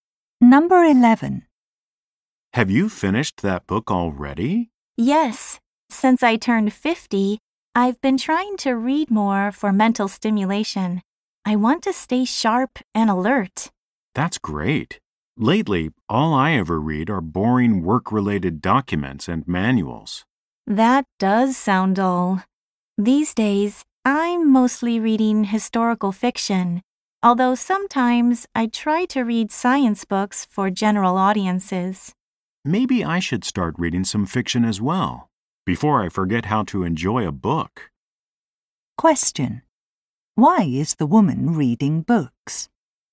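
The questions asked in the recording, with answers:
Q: Why is the woman reading books?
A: To stay mentally sharp and alert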